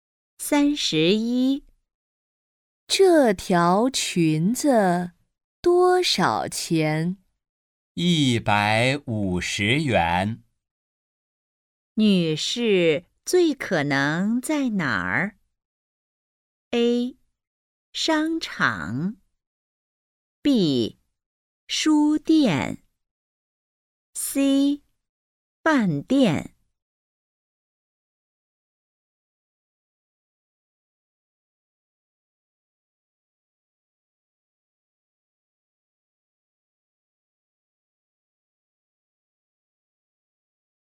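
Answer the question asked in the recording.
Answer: A: 商场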